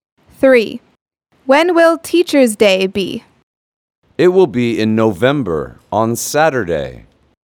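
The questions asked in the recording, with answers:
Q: When will Teacher's Day be?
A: In November, on Saturday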